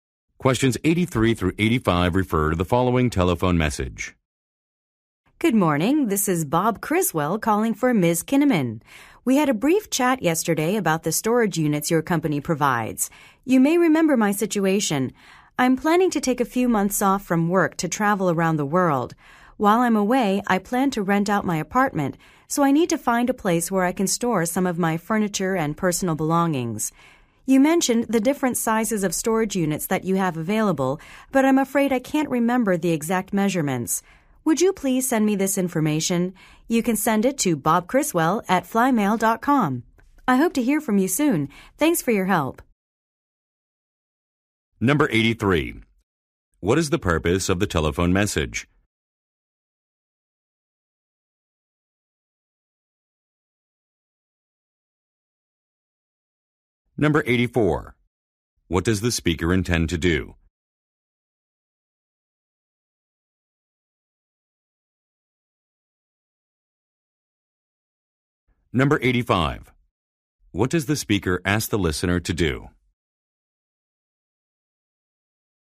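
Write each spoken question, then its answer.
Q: What is the purpose of the telephone message?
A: To ask for information about storage unit sizes

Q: What does the speaker intend to do?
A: Travel around the world

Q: What does the speaker ask the listener to do?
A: Email him the storage unit measurements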